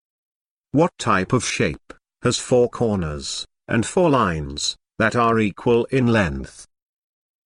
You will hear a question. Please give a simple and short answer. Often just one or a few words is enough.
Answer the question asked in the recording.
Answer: Square